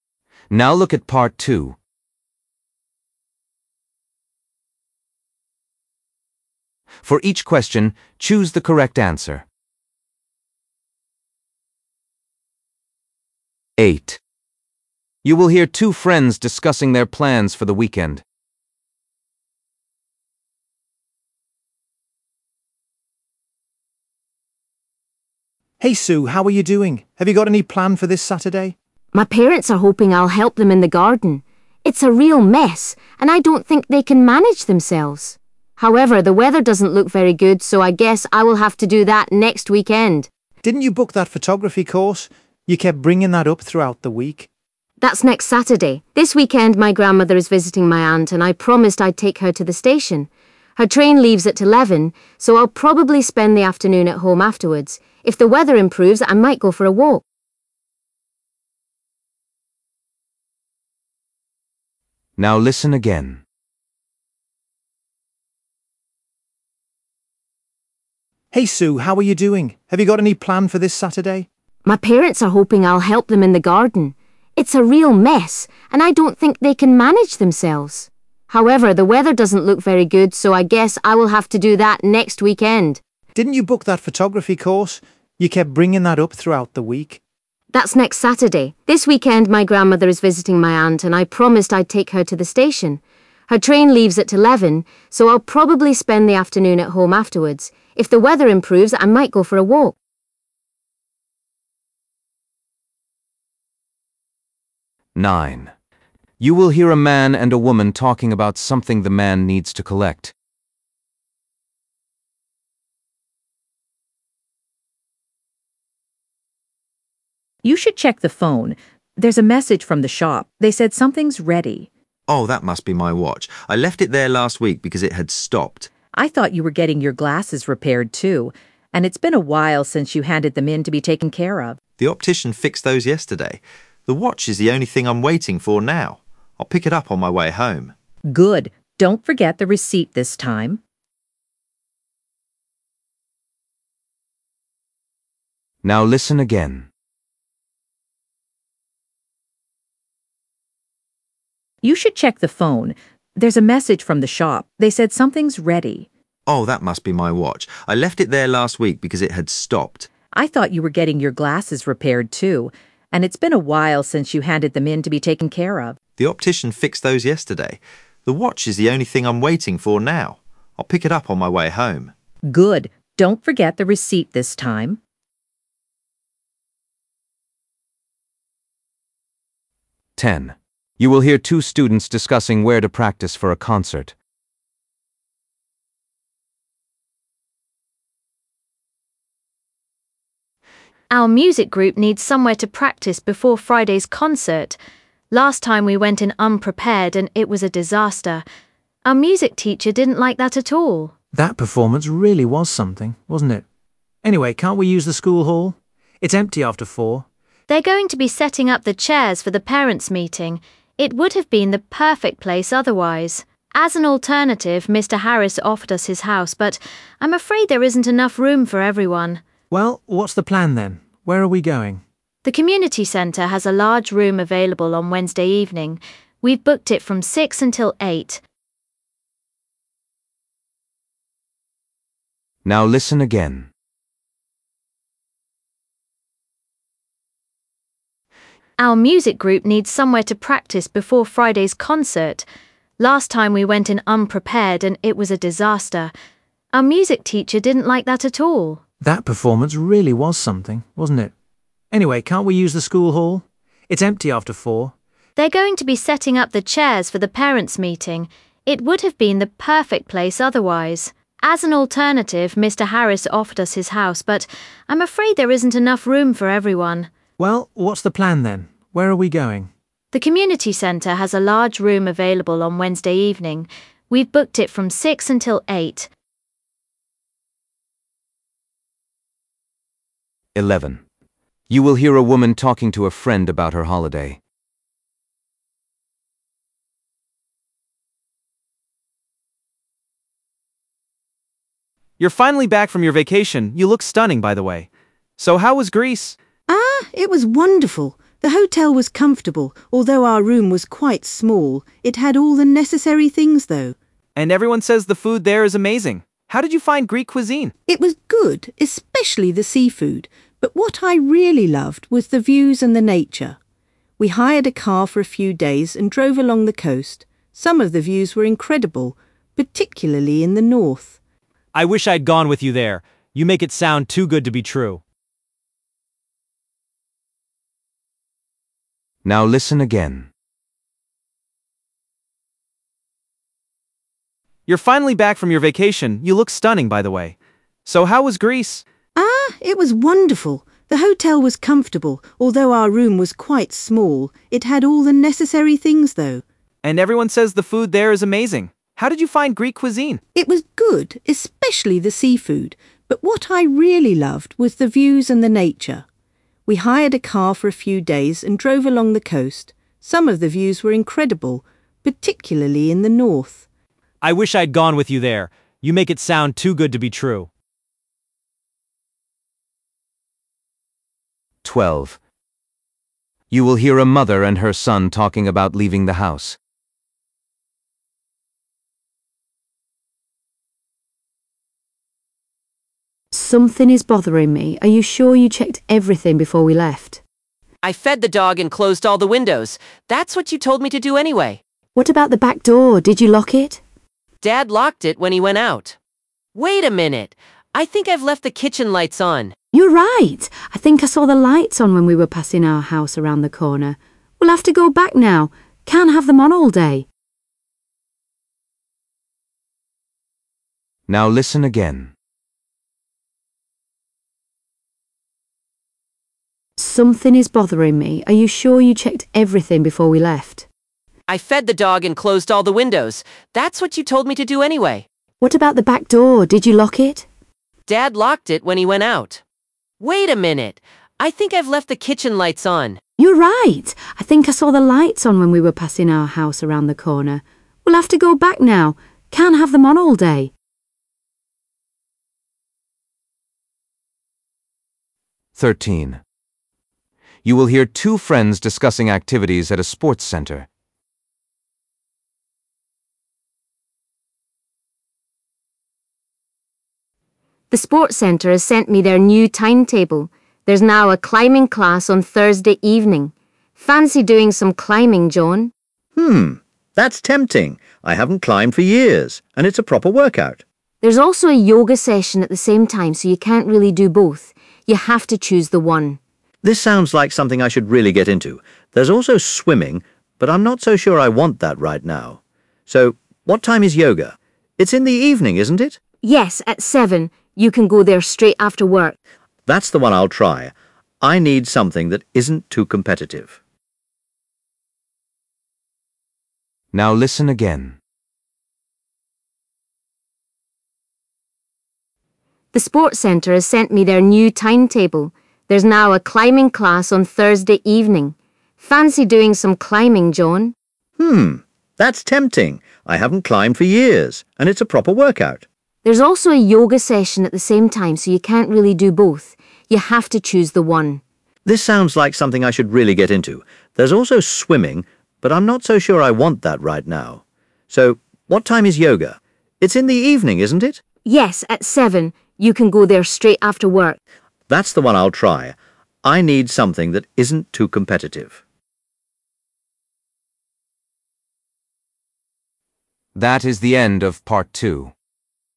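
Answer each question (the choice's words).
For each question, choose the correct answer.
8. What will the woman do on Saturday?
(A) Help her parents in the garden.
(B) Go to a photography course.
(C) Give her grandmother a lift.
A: Give her grandmother a lift.

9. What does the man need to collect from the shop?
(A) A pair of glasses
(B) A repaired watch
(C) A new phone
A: A repaired watch

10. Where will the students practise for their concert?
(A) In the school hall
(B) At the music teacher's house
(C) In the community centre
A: In the community centre

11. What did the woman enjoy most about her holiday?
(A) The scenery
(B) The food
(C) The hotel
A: The scenery

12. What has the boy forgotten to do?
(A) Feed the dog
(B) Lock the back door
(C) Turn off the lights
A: Turn off the lights

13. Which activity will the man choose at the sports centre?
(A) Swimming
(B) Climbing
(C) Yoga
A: Yoga

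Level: B1 Preliminary (PET)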